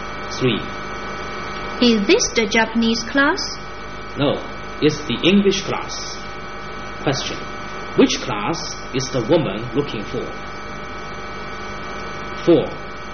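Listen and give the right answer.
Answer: The Japanese class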